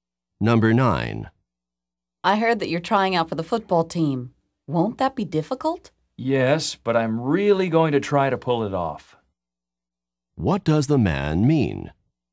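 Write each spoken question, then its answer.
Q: What does the man mean?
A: He will try hard to succeed in making the team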